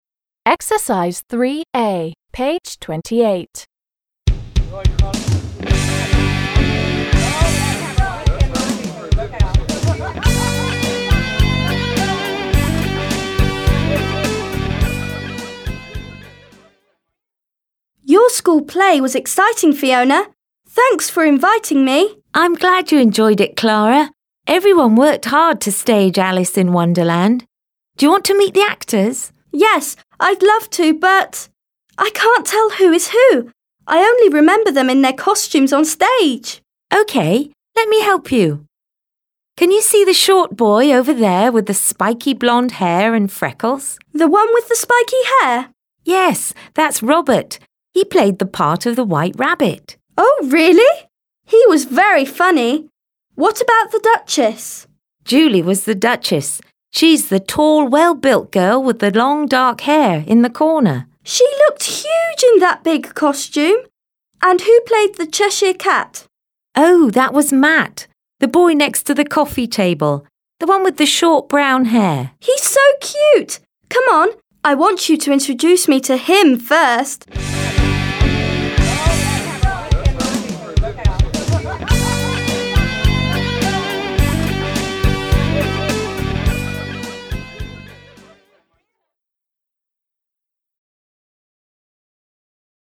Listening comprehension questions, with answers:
3. a) Прочитай первые предложения. Где Клара и Фиона: в театре? на вечеринке? Какие из персонажей из упражнения 1 были в пьесе? Послушай, прочитай и проверь.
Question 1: Где Клара и Фиона: в театре? на вечеринке?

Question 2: Какие из персонажей из упражнения 1 были в пьесе?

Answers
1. Clara and Fiona are at a party.
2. Alice and the Duchess were on the stage in the play.

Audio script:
Clara: Your school play was exciting, Fiona! Thanks for inviting me.
Fiona: I'm glad you enjoyed it, Clara. Everyone worked hard to stage Alice in Wonderland. Do you want to meet the actors?
Clara: Yes, I'd love to, but ... I can't tell who is who! I only remember them in their costumes on stage!
Fiona: OK, let me help you. Can you see the short boy over there with spiky blond hair and freckles?
Fiona: Yes. That's Robert. He played the part of the White Rabbit!
Clara: Oh, really? He was very funny! What about the Duchess?
Fiona: Julie was the Duchess! She's the tall, well−built girl with long dark hair in the corner.
Clara: She looked huge in that big costume! And who played the Cheshire Cat?
Fiona: Oh, that was Matt, the boy next to the coffee table.

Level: 7 класс